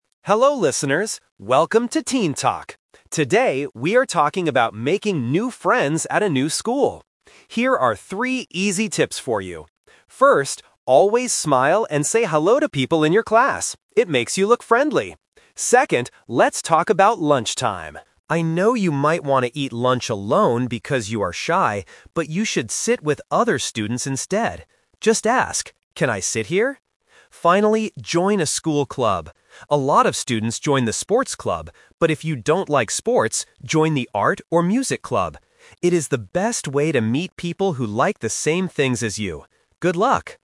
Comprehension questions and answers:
Listen to a podcast host giving advice. Choose the correct answer (A, B, or C) for each question.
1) What is the first tip to make new friends?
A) Help classmates with their homework.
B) Smile and say hello to people.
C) Give gifts to other students.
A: B) Smile and say hello to people.

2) What does the host say you should do at lunchtime?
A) Eat lunch alone if you are shy.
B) Go home to eat lunch.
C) Sit with other students.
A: C) Sit with other students.

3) Why is joining a club a good idea?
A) You can meet people who like the same things.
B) You can become very good at sports.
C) You can get better grades in music class.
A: A) You can meet people who like the same things.

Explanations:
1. The host clearly says, "First, always smile and say hello to people in your class." Options (A) and (C) are nice things to do, but they are not mentioned in the audio.
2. This is "The Twist". The host knows you might want to eat alone (Option A - the trap), but advises you to change that behavior: "but you should sit with other students instead." Option (B) is not mentioned.
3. The host says joining a club "is the best way to meet people who like the same things as you." Options (B) and (C) are traps because "sports" and "music" are mentioned in the audio as examples of clubs, but they are not the reason why you should join a club.

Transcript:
Host (Monologue): Hello listeners! Welcome to "Teen Talk". Today, we are talking about making new friends at a new school. Here are three easy tips for you. First, always smile and say hello to people in your class. It makes you look friendly. Second, let's talk about lunchtime. I know you might want to eat lunch alone because you are shy, but you should sit with other students instead. Just ask, "Can I sit here?" Finally, join a school club. A lot of students join the sports club, but if you don't like sports, join the art or music club.

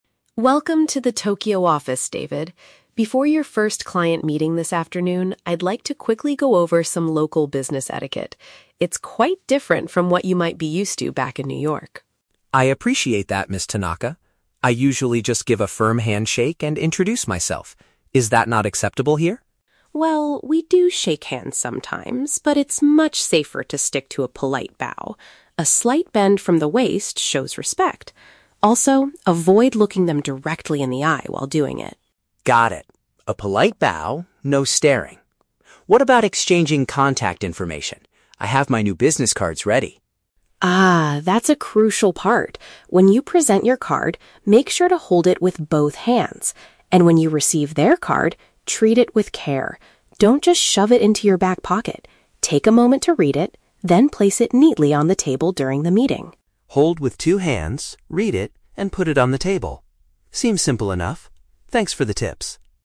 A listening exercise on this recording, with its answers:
Listen to the conversation between an HR manager and a new employee. Choose the correct answer (A, B, or C) for each question.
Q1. Why does Ms. Tanaka want to speak with David?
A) To welcome him back to the company's New York branch.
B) To prepare him for an upcoming appointment with a customer.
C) To hand over his newly printed stack of business cards.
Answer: B) To prepare him for an upcoming appointment with a customer.

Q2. How does the manager suggest David should greet their local partners?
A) By gripping their hand firmly and introducing himself.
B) By nodding his head briefly while maintaining strong eye contact.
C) By bending forward slightly to demonstrate politeness.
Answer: C) By bending forward slightly to demonstrate politeness.

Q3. What is David warned NOT to do when receiving a business card?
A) Putting it away carelessly into his clothing.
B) Taking a few seconds to examine the printed information.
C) Writing additional contact details on the back of it.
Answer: A) Putting it away carelessly into his clothing.

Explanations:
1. Ms. Tanaka says she wants to go over some etiquette "before your first client meeting" (an appointment with a customer). Option (A) is a trap; she mentions New York, but that is where David is from, not where they are now. Option (C) is a trap; David says he already has his business cards ready, she isn't giving them to him.
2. Ms. Tanaka tells David to do a "polite bow" which is a "slight bend from the waist" to show "respect" (politeness). Option (A) is a trap; this is what David usually does in New York, not what she suggests. Option (B) is incorrect because she specifically tells him to "avoid looking them directly in the eye" (no strong eye contact).
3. Ms. Tanaka tells him "Don't just shove it into your back pocket" (putting it away carelessly into his clothing). Option (B) is a trap; she explicitly tells him to "take a moment to read it", so this is something he should do, not avoid. Option (C) is a plausible etiquette rule in reality, but it is never mentioned in the audio.

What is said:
Ms. Tanaka: Welcome to the Tokyo office, David. Before your first client meeting this afternoon, I'd like to quickly go over some local business etiquette. It's quite different from what you might be used to back in New York.
David: I appreciate that, Ms. Tanaka. I usually just give a firm handshake and introduce myself. Is that not acceptable here?
Ms. Tanaka: Well, we do shake hands sometimes, but it's much safer to stick to a polite bow. A slight bend from the waist shows respect. Also, avoid looking them directly in the eye while doing it.
David: Got it. A polite bow, no staring. What about exchanging contact information? I have my new business cards ready.
Ms. Tanaka: Ah, that's a crucial part! When you present your card, make sure to hold it with both hands. And when you receive their card, treat it with care. Don't just shove it into your back pocket. Take a moment to read it, then place it neatly on the table during the meeting.
David: Hold with two hands, read it, and put it on the table. Seems simple enough. Thanks for the tips!

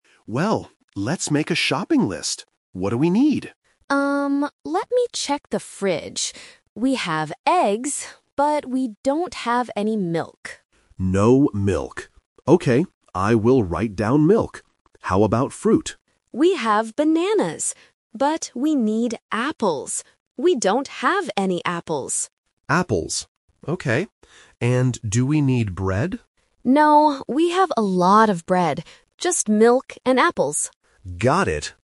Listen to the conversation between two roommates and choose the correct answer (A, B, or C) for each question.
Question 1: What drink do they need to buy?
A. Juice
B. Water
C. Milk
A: C. Milk

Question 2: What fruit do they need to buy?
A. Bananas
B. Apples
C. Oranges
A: B. Apples

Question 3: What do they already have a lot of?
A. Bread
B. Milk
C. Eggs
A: A. Bread

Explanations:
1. The woman says "we don't have any milk". Juice and Water are plausible but not mentioned in the audio.
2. The woman explicitly states "we need apples. We don't have any apples." Option (A) Bananas is The Trap: bananas are mentioned, but the woman says "We have bananas", so they don't need to buy them. Option (C) Oranges is not mentioned.
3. When the man asks if they need bread, the woman replies "No, we have a lot of bread." Option (C) Eggs is The Trap: eggs are mentioned as something they have, but the script does not emphasize having "a lot of" them compared to the specific question about bread. Option (B) Milk is wrong because it's what they lack.

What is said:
Man: Well, let's make a shopping list. What do we need?
let me check the fridge. We have eggs... but we don't have any milk.
Man: No milk. Okay, I will write down milk. How about fruit?
Woman: We have bananas. But we need apples. We don't have any apples.
Man: Apples. Okay. And do we need bread?
Woman: No, we have a lot of bread. Just milk and apples.
Man: Got it!

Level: A1

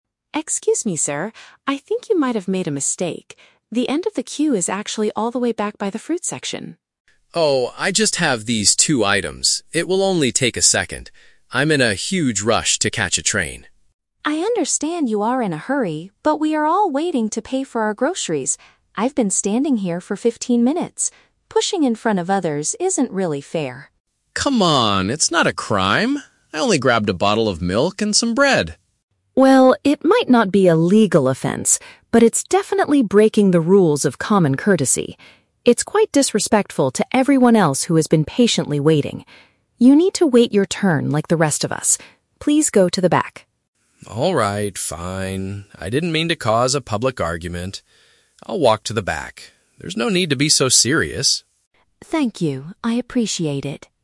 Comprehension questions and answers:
Listen to the conversation between two people at a supermarket. Choose the correct answer (A, B, or C) for each question.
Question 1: Why does the woman speak to the man?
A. Because he dropped his milk and bread on the floor.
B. Because he moved ahead of the waiting people.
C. Because he asked for directions to the fruit section.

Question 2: What is the man's excuse for his action?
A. He needs to leave quickly for public transportation.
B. He has a serious medical emergency at home.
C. He did not see anyone standing in the queue.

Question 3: How does the woman describe the man's behavior?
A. She says it is a serious legal offense.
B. She says it is a trick to steal from the supermarket.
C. She says it shows a lack of respect for others.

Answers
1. B. Because he moved ahead of the waiting people.
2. A. He needs to leave quickly for public transportation.
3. C. She says it shows a lack of respect for others.

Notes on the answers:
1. The woman complains that "Pushing in front of others isn't really fair." Pushing in front means moving ahead of the waiting people. The Trap (A): The man mentions his "bottle of milk and some bread," but he did not drop them. He just wants to buy them quickly. The Trap (C): The woman mentions the "fruit section" to show him where the line ends, but the man never asked for directions.
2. The man says, "I'm in a huge rush to catch a train." Catching a train means using public transportation. The Trap (C): It is a common excuse for line-cutters to say they "didn't see the line," but this man admits he knows there is a line; he just thinks his two items will "only take a second." Plausible but not mentioned (B): A medical emergency would make someone rush, but he specifically mentions a train, not a medical issue.
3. The woman says his action is "quite disrespectful to everyone else." Being disrespectful means showing a lack of respect. The Trap (A): The audio includes the words "crime" and "legal offense", but the woman explicitly says, "it might not be a legal offense." Plausible but not mentioned (B): Stealing is a common supermarket crime, but she is angry because he is breaking the rules of waiting, not because he is stealing.

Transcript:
Customer A: Excuse me, sir. I think you might have made a mistake. The end of the queue is actually all the way back by the fruit section.
Customer B: Oh, I just have these two items. It will only take a second. I'm in a huge rush to catch a train.
Customer A: I understand you are in a hurry, but we are all waiting to pay for our groceries. I've been standing here for fifteen minutes. Pushing in front of others isn't really fair.
Customer B: Come on, it's not a crime! I only grabbed a bottle of milk and some bread.
Customer A: Well, it might not be a legal offense, but it's definitely breaking the rules of common courtesy. It's quite disrespectful to everyone else who has been patiently waiting. You need to wait your turn like the rest of us. Please go to the back.
I didn't mean to cause a public argument. I'll walk to the back. There's no need to be so serious.

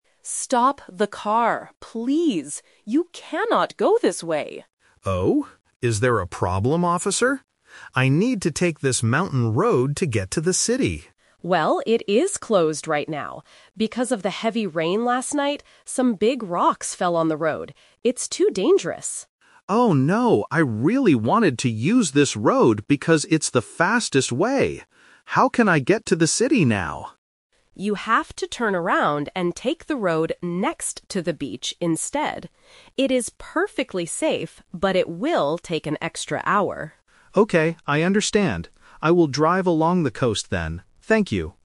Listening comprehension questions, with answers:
Listen to the conversation between a police officer and a driver. Choose the correct answer (A, B, or C) for each question.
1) What happened on the mountain road?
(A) There is a bad car accident.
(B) Some big rocks fell on it.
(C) It is covered in thick snow.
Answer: (B) Some big rocks fell on it.

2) Why did the driver originally want to use the mountain road?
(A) Because it is the fastest way.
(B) Because it has a beautiful view.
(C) Because it is perfectly safe.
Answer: (A) Because it is the fastest way.

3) Which way will the driver go to reach the city now?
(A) Over the mountain.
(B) Next to the beach.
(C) Through the forest.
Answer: (B) Next to the beach.

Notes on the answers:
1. Why B is correct: The police officer clearly explains the problem: "Because of the heavy rain last night, some big rocks fell on the road." Why A & C are wrong: A car accident and thick snow are both plausible reasons for a road closure, but they are never mentioned in the audio.
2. Why A is correct: The driver states his original reason: "I really wanted to use this road because it's the fastest way." Why B is wrong: A beautiful view is not mentioned. Why C is a trap: The phrase "perfectly safe" is spoken in the audio, but the police officer uses it to describe the other road (next to the beach), not the mountain road.
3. Why B is correct: This is the A2 Twist. Because the mountain road is closed, the police officer tells him to "take the road next to the beach instead," and the driver agrees to "drive along the coast." Why A is a trap: Over the mountain was the driver's original plan, which he has to change. Why C is wrong: A forest is a geographical feature, but it is not mentioned in the dialogue.

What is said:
Police: Stop the car, please! You cannot go this way.
Driver: Oh? Is there a problem, officer? I need to take this mountain road to get to the city.
Police: Well, it is closed right now. Because of the heavy rain last night, some big rocks fell on the road. It's too dangerous.
Driver: Oh, no. I really wanted to use this road because it's the fastest way. How can I get to the city now?
Police: You have to turn around and take the road next to the beach instead. It is perfectly safe, but it will take an extra hour.

